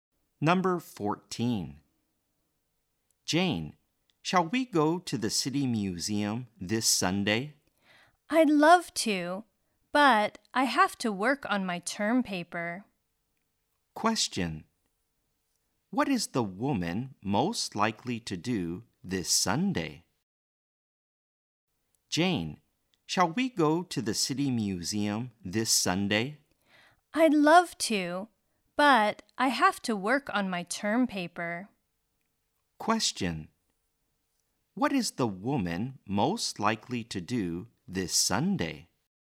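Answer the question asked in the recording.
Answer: Work on her term paper.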